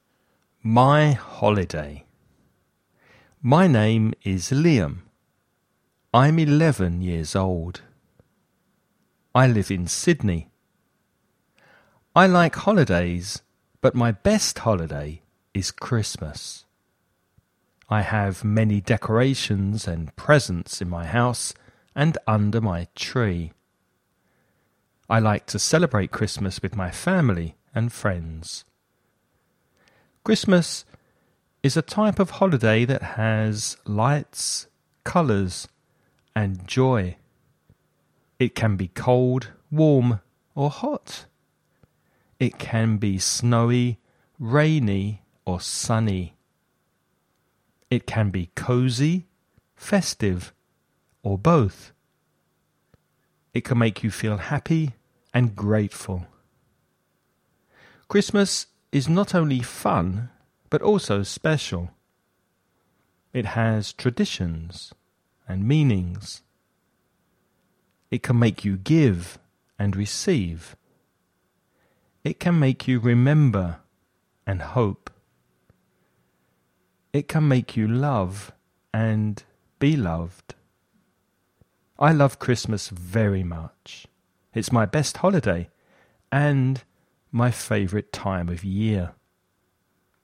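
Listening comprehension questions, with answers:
Escucha y contesta las siguientes preguntas.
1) Where does Liam live?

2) What is his best holiday?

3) What are some things that Christmas has?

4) What are some things that Christmas can be?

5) How does Christmas make Liam special?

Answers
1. In Sydney.
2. Christmas.
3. Lights, colours and joy; traditions and meanings.
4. Cold, warm or hot; snowy, rainy or sunny; cozy, festive or both.
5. It makes him give and receive, remember and hope, love and be loved.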